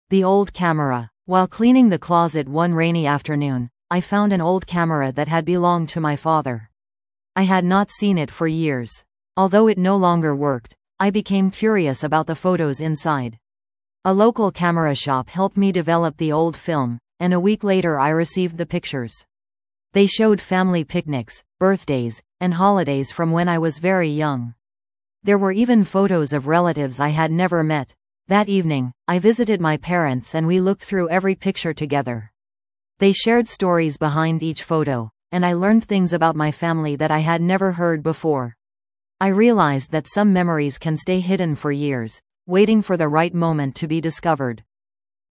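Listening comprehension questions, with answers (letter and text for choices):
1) What did the speaker find?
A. An old camera.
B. A photo album.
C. A family diary.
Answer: A. An old camera.

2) What did the developed photos show?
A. Famous landmarks.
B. Family memories from years ago.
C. A recent vacation.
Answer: B. Family memories from years ago.

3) What did the speaker do after receiving the photos?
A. Sold the camera.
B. Visited the parents to look at the pictures together.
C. Framed every picture.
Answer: B. Visited the parents to look at the pictures together.

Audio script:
The Old Camera
While cleaning the closet one rainy afternoon, I found an old camera that had belonged to my father. I had not seen it for years. Although it no longer worked, I became curious about the photos inside. A local camera shop helped me develop the old film, and a week later I received the pictures. 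They showed family picnics, birthdays, and holidays from when I was very young. There were even photos of relatives I had never met. That evening, I visited my parents and we looked through every picture together. They shared stories behind each photo, and I learned things about my family that I had never heard before. I realized that some memories can stay hidden for years, waiting for the right moment to be discovered.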